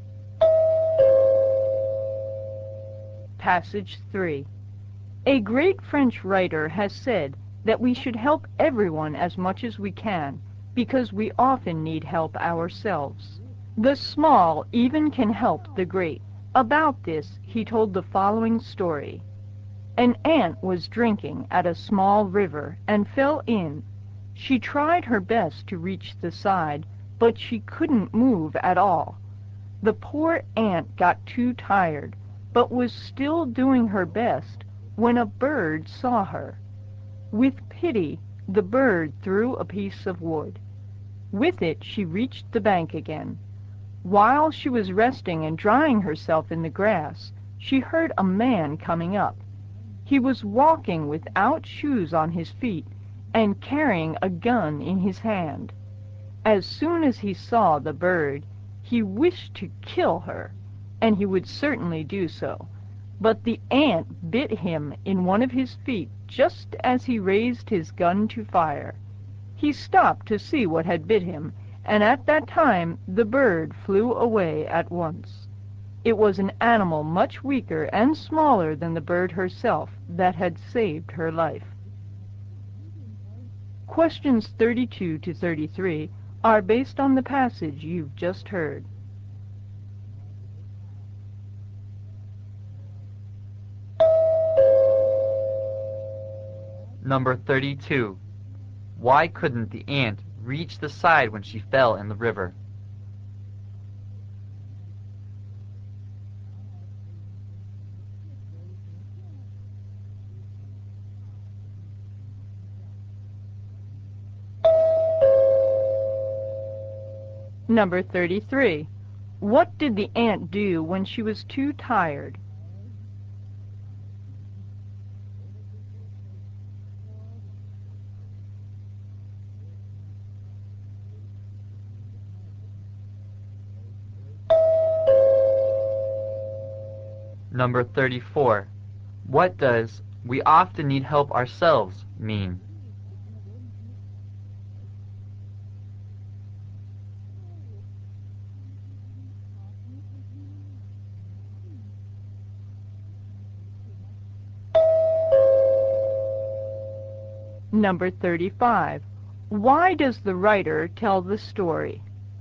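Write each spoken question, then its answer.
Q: What did the ant do when she was too tired?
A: She kept doing her best

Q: What does "we often need help ourselves" mean?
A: Everyone needs help from others at times

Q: Why does the writer tell the story?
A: To show we should help others, since even the small can help the great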